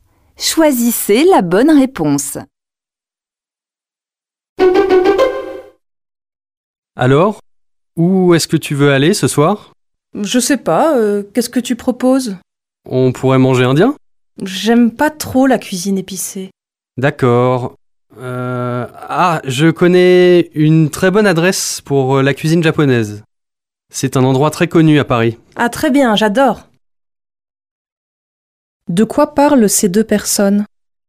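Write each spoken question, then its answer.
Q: De quoi parlent ces deux personnes?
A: Du restaurant où aller manger ce soir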